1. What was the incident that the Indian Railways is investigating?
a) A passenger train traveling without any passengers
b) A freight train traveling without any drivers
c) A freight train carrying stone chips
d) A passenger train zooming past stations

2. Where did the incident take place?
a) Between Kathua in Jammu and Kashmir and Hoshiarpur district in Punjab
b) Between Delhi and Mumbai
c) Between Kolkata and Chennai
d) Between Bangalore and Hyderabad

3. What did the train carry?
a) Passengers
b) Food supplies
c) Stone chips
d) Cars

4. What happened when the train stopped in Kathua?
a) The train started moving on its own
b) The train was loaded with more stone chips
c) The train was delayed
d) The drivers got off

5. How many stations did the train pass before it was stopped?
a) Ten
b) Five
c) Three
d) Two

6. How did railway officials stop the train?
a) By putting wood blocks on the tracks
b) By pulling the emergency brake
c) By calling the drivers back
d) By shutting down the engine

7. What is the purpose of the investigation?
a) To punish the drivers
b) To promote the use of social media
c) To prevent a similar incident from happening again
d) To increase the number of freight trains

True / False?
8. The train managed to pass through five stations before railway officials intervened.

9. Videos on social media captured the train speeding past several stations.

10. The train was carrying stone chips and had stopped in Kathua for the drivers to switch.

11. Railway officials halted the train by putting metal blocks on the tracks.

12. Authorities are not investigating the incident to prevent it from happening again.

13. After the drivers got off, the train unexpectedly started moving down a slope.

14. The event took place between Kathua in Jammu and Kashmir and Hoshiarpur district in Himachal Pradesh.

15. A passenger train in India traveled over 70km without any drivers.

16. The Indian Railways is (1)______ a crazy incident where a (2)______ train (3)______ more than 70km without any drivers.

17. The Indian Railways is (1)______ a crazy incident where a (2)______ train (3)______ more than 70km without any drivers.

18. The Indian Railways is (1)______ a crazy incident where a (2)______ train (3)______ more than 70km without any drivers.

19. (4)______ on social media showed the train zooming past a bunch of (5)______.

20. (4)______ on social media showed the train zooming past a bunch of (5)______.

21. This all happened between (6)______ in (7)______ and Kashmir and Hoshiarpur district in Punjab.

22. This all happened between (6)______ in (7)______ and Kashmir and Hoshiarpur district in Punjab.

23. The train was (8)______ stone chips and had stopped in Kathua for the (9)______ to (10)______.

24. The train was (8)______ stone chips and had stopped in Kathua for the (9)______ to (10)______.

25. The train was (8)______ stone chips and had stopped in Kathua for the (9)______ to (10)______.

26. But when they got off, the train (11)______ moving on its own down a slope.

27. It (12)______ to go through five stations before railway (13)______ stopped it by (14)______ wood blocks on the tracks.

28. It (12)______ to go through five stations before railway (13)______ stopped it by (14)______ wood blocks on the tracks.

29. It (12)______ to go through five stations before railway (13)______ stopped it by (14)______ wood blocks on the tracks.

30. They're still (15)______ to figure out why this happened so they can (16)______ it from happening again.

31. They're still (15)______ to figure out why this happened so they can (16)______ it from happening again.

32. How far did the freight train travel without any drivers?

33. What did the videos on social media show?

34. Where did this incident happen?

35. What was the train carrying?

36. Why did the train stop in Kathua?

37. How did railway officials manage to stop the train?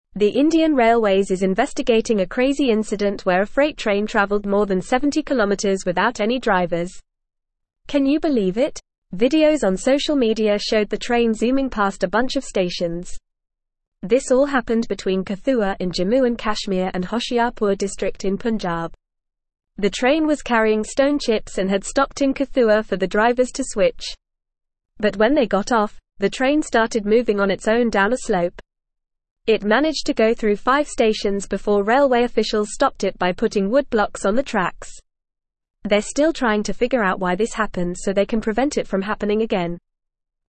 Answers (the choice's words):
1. A freight train traveling without any drivers
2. Between Kathua in Jammu and Kashmir and Hoshiarpur district in Punjab
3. Stone chips
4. The drivers got off
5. Five
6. By putting wood blocks on the tracks
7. To prevent a similar incident from happening again
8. True
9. True
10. True
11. False
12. False
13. True
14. False
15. False
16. investigating
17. freight
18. traveled
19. Videos
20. stations
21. Kathua
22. Jammu
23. carrying
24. drivers
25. switch
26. started
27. managed
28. officials
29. putting
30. trying
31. prevent
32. The freight train traveled more than 70km without any drivers.
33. The videos on social media showed the train zooming past a bunch of stations.
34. This incident happened between Kathua in Jammu and Kashmir and Hoshiarpur district in Punjab.
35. The train was carrying stone chips.
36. The train stopped in Kathua for the drivers to switch.
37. Railway officials stopped the train by putting wood blocks on the tracks.

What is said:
The Indian Railways is investigating a crazy incident where a freight train traveled more than 70km without any drivers. Can you believe it? Videos on social media showed the train zooming past a bunch of stations. This all happened between Kathua in Jammu and Kashmir and Hoshiarpur district in Punjab. But when they got off, the train started moving on its own down a slope. It managed to go through five stations before railway officials stopped it by putting wood blocks on the tracks. They're still trying to figure out why this happened so they can prevent it from happening again.

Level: Level 3